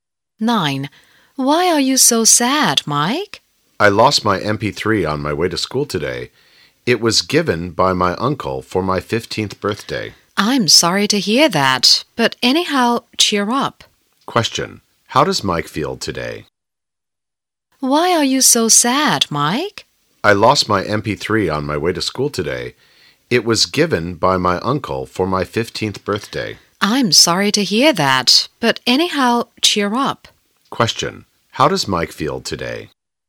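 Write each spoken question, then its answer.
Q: How does Mike feel today?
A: Sad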